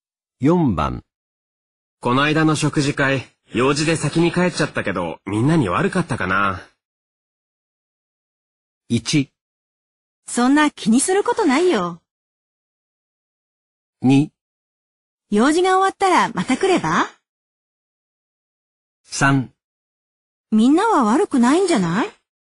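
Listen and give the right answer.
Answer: 1: そんな気にすることないよ。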